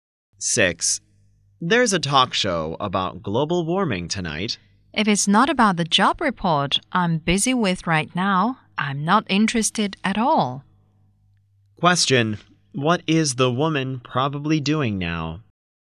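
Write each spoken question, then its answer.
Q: What is the woman probably doing now?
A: Working on a job report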